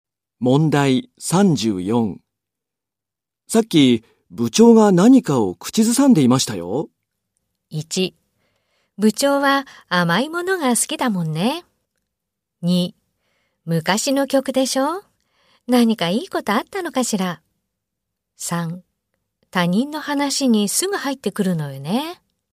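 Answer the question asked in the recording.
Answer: 2: 昔の曲でしょ?何かいいことあったのかしら?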